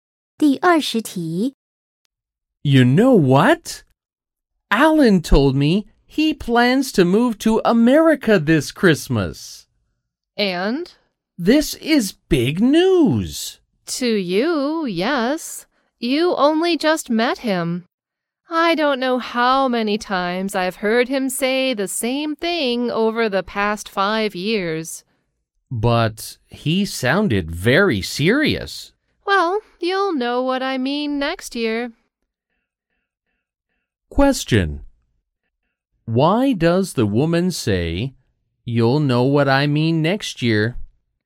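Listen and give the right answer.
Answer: Alan has said this for years and won't really move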